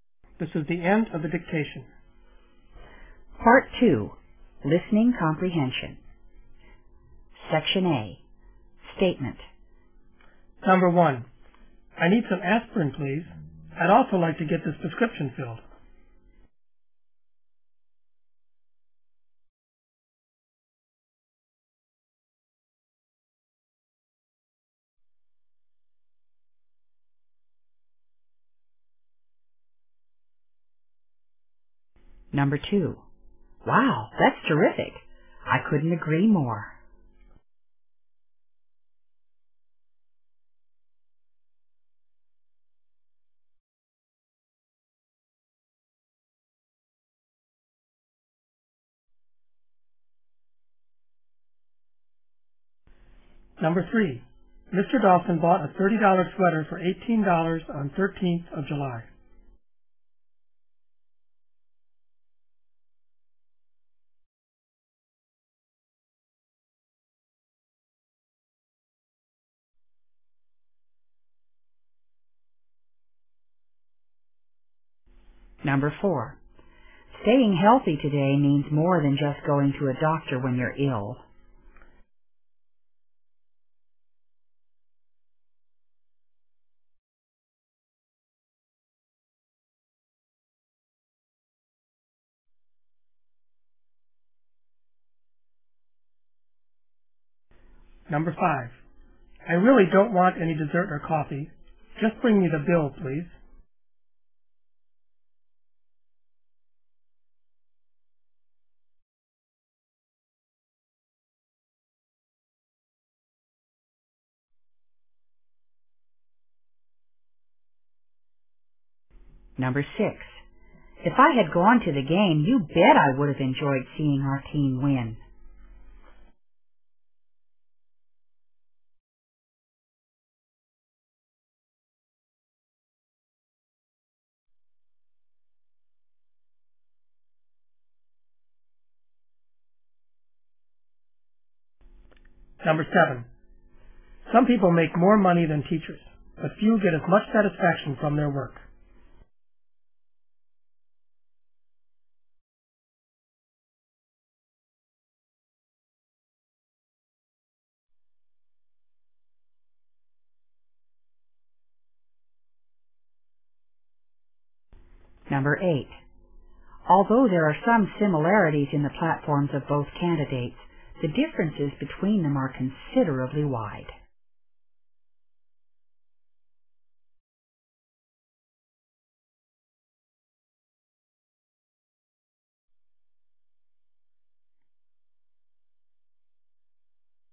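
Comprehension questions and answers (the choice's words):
In this section you will hear eight statements. At the end of each statement you will be given 10 seconds to answer the question.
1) The speaker is talking to a__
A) doctor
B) pharmacist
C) mechanic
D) waiter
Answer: pharmacist

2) What is the speaker's attitude?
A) He couldn't agree any more.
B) He agrees completely.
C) He agrees partially.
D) He couldn't stand it any more.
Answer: He agrees completely.

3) How much did Mr. Dawson pay for the sweater?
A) $30.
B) $13.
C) $80.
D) $18.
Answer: $18.

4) What does "staying healthy" mean today?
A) You should often go to a doctor.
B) Going to a doctor regularly for helps.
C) Keep fit and strong all the time.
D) You should never go to a doctor.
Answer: Keep fit and strong all the time.

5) Where is the speaker?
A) In a bank.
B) In a restaurant.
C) In an office.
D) In a shop.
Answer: In a restaurant.

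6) The speaker regretted having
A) missed the game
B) gone to the game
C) won the game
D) missed the bet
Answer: missed the game

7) What does the speaker think about teachers?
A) Teachers get much satisfaction from work.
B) Teachers get little satisfaction from work.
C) Few teachers are satisfied with their work.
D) Few teachers are satisfied with their salary.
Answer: Teachers get much satisfaction from work.

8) The speaker is comparing two.__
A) research projects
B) political declarations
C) kinds of candies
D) political events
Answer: political declarations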